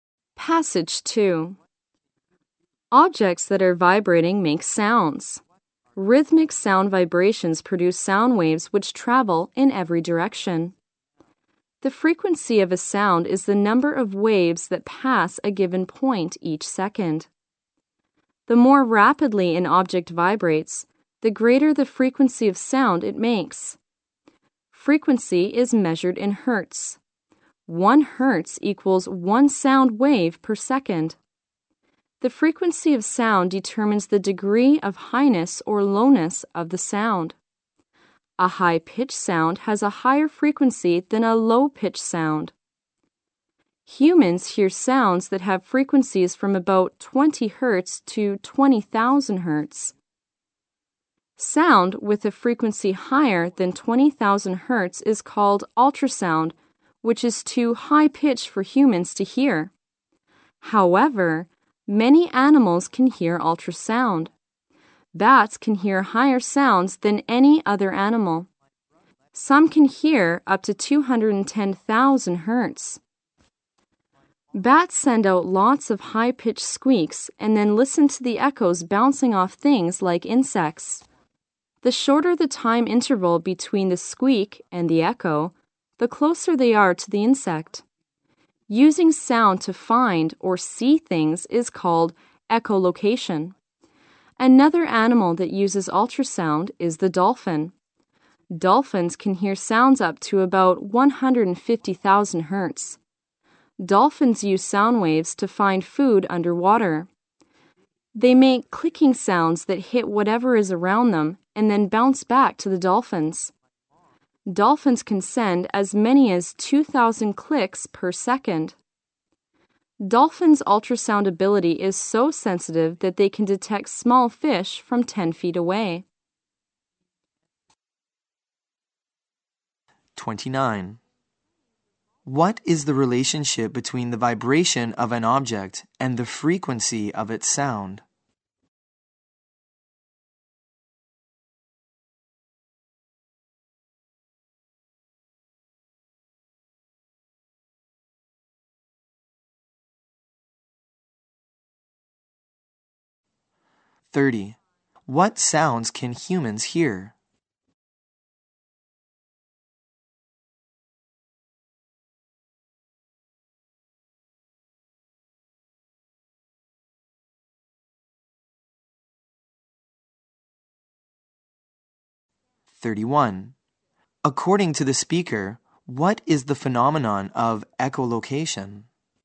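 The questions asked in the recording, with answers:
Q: What is the relationship between the vibration of an object and the frequency of its sound?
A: The faster an object vibrates, the higher the frequency of its sound.

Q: What sounds can humans hear?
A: Sounds from about 20 to 20,000 hertz.

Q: According to the speaker, what is the phenomenon of echolocation?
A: Using sound to find or see things.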